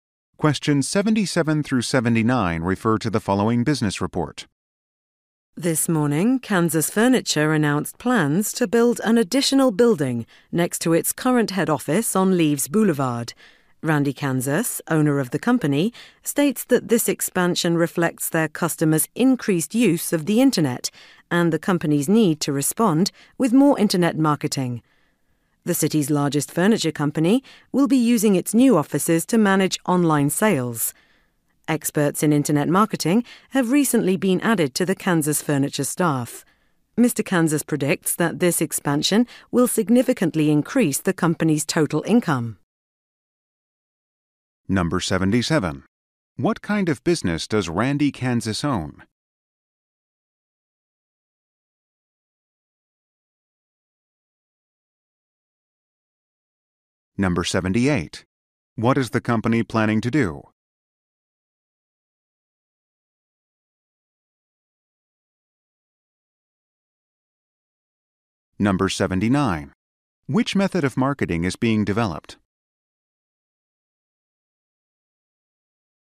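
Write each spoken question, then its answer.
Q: What kind of business does Randy Kansas own?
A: A furniture company

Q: What is the company planning to do?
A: Build an additional building

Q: Which method of marketing is being developed?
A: Internet marketing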